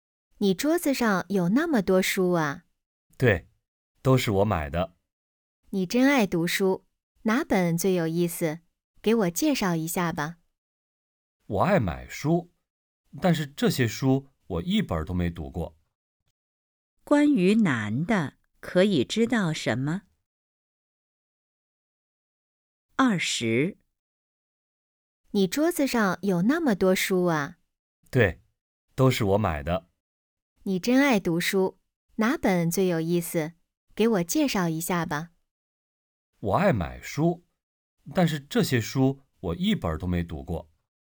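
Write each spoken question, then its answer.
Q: 关于男的,可以知道什么?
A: 他爱买书,但这些书一本都没读过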